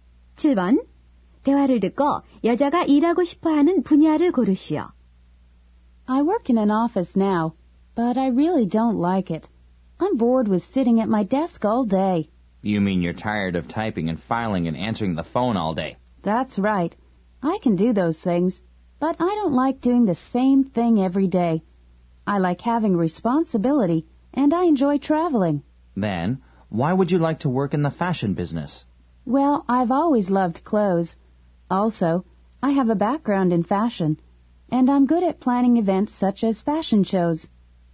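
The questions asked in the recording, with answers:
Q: 대화를 듣고 여자가 일하고 싶어하는 분야를 고르시오.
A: 패션 업계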